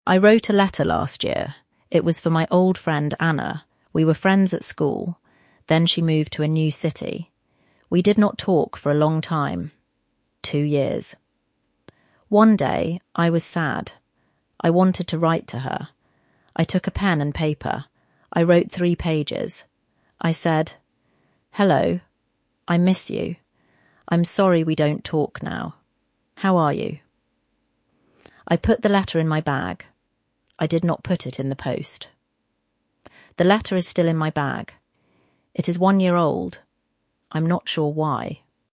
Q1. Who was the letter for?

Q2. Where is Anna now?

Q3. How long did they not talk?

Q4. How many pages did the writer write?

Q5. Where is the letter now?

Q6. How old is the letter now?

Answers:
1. Anna, the writer's old friend from school.
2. In a new city. She moved away.
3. Two years.
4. Three pages.
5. In the writer's bag.
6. One year old.

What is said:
I wrote a letter last year.
It was for my old friend, Anna. We were friends at school. Then she moved to a new city.
We did not talk for a long time. Two years.
One day, I was sad. I wanted to write to her. I took a pen and paper. I wrote three pages.
I said
'Hello. I miss you. I am sorry we don't talk now. How are you?'
I put the letter in my bag. I did not put it in the post.
The letter is still in my bag. It is one year old.